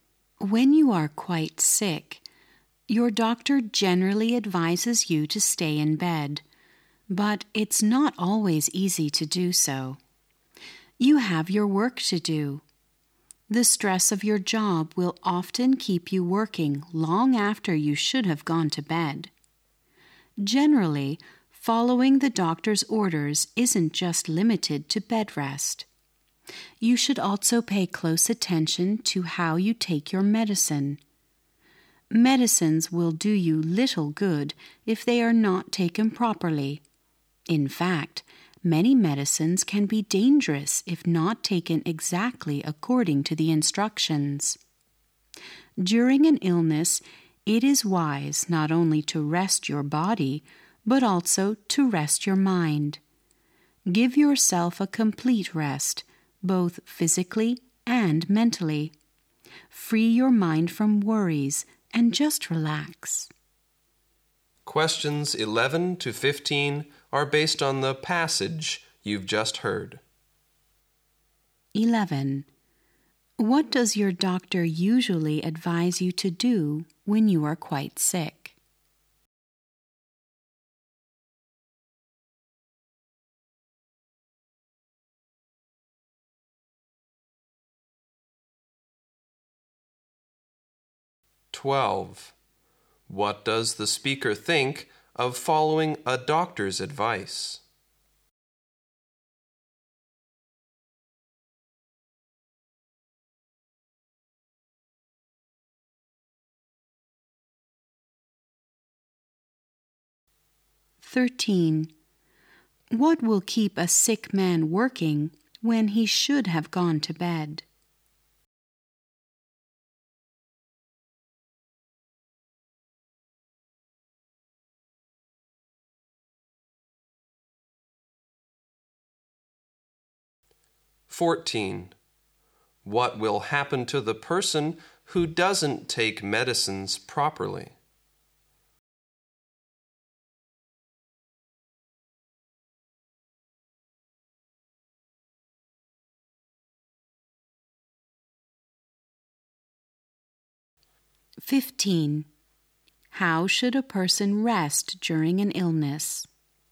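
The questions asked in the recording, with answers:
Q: What does your doctor usually advise you to do when you are quite sick?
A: Stay in bed

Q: What will keep a sick man working when he should have gone to bed?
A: The stress of his job

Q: What will happen to the person who doesn't take medicines properly?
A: The medicines will do little good and can be dangerous.

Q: How should a person rest during an illness?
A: Both physically and mentally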